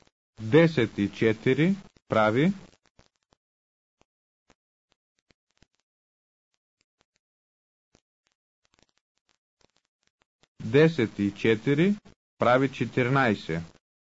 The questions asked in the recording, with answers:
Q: 10 и 4 прави.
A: 10 и 4 прави 14.